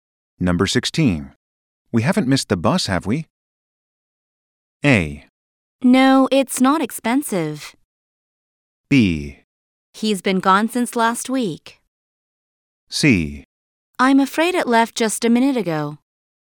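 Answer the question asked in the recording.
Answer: C: I'm afraid it left just a minute ago.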